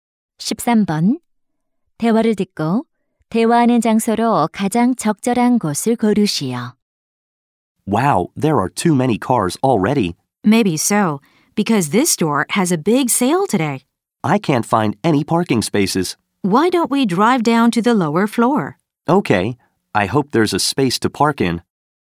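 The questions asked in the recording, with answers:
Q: 대화를 듣고 대화하는 장소로 가장 적절한 곳을 고르시오.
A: 주차장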